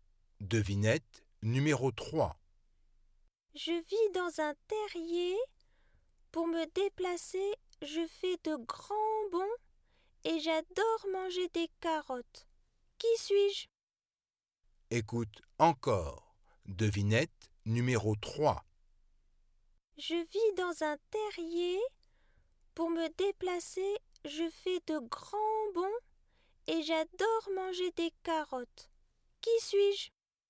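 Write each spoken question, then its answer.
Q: Qui suis-je?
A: un lapin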